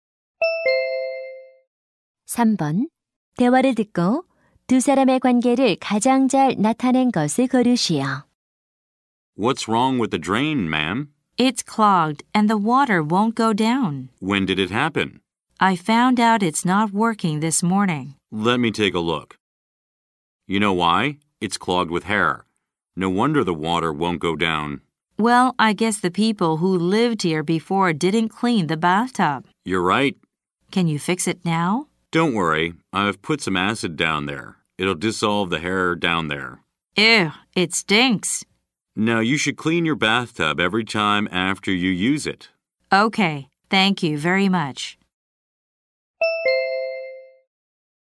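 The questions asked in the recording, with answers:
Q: 대화를 듣고 두 사람의 관계를 가장 잘 나타낸 것을 고르시오.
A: 배관공 - 집주인(고객)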